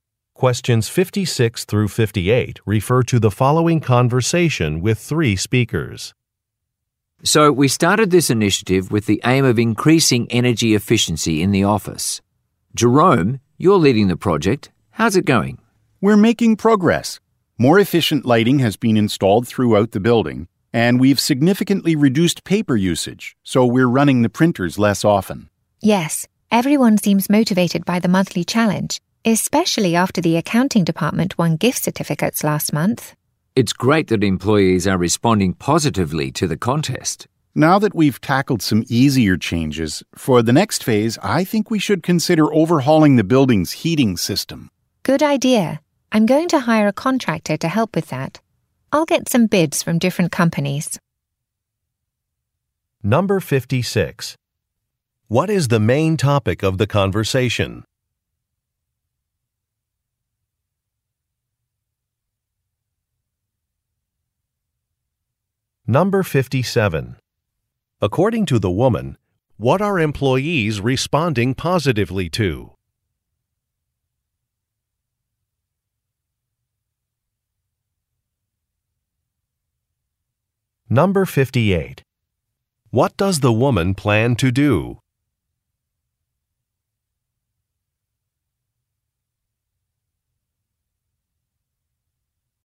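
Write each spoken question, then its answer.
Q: What is the main topic of the conversation?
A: An initiative to increase energy efficiency in the office

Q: According to the woman, what are employees responding positively to?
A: The monthly energy-saving contest (challenge)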